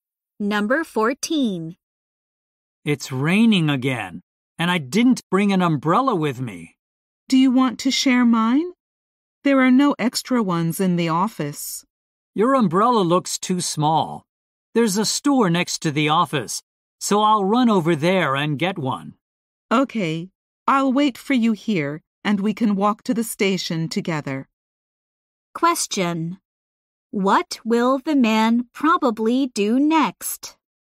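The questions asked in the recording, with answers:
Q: What will the man probably do next?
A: Go to the store next to the office to buy an umbrella.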